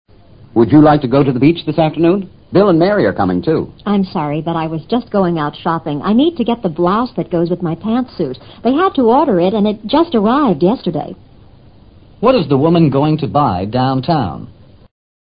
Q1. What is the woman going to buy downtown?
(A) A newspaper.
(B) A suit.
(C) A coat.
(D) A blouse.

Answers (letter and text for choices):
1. (D) A blouse.

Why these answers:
I need to get the blouse...提供了选择答案的信息。(that)goes with...: 与之相配的罩衫。pants suit 是一套裤子与上衣相配的女子服装。downtown:繁华的商业区。